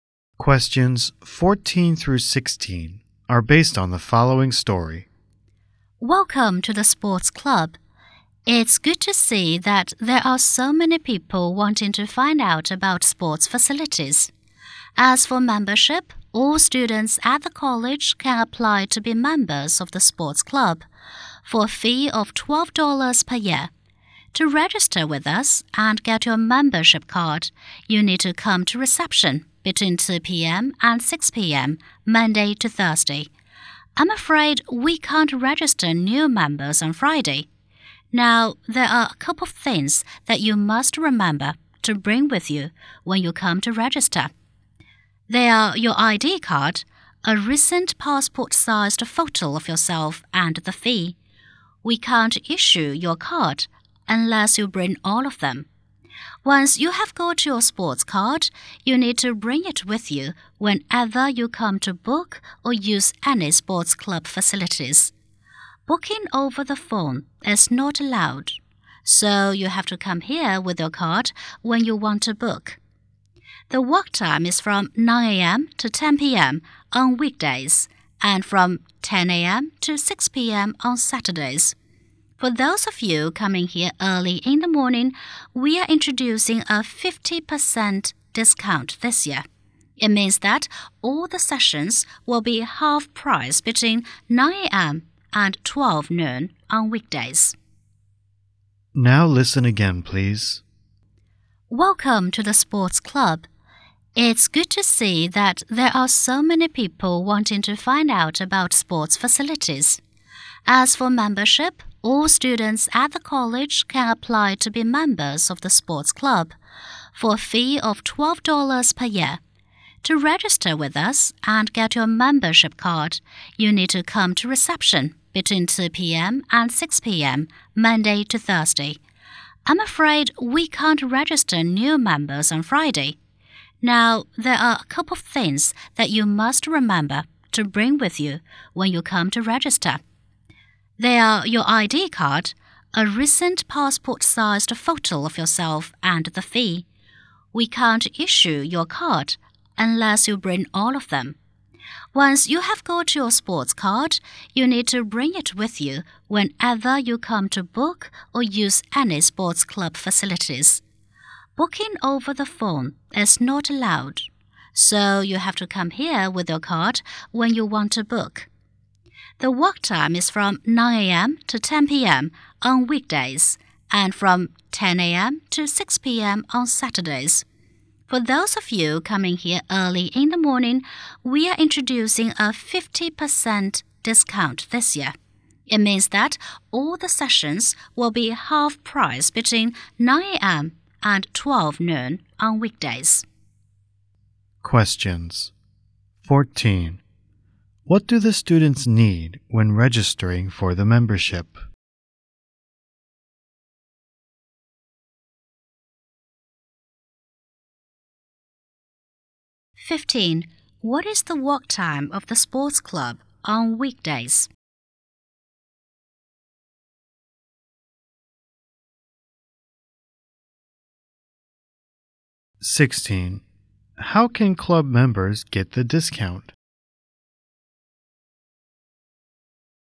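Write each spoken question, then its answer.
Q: What do the students need when registering for the membership?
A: ID card, a recent passport-sized photo and the fee

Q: What is the work time of the sports club on weekdays?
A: From 9 a.m. to 10 p.m.

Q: How can club members get the discount?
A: By using the club between 9 a.m. and 12 noon on weekdays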